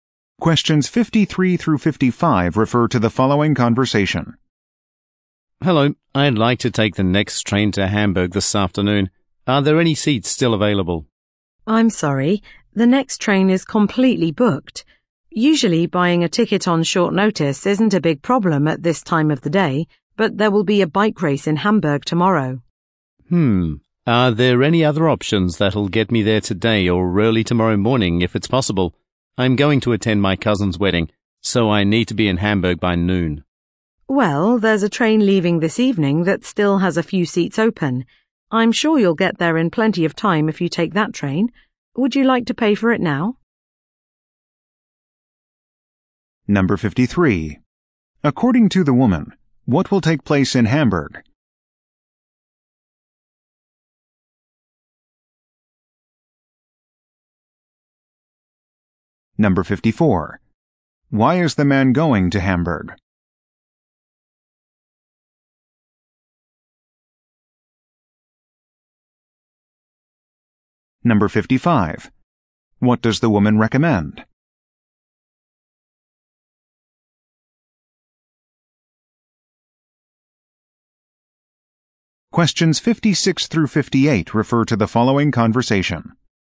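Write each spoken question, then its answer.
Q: According to the woman, what will take place in Hamburg?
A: A bike race

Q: Why is the man going to Hamburg?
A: To attend his cousin's wedding

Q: What does the woman recommend?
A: Taking the train leaving this evening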